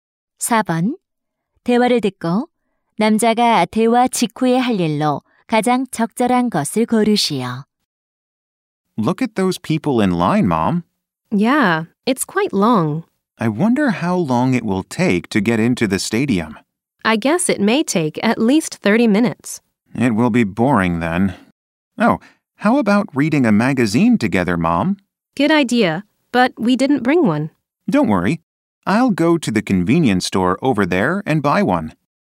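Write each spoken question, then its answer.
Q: 대화를 듣고 남자가 대화 직후에 할 일로 가장 적절한 것을 고르시오.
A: 편의점에 가서 잡지 사기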